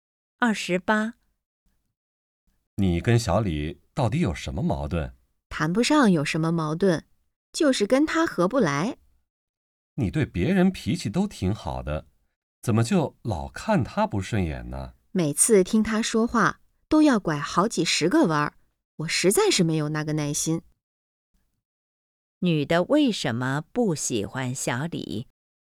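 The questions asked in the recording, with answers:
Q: 女的为什么不喜欢小李?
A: 他说话拐弯抹角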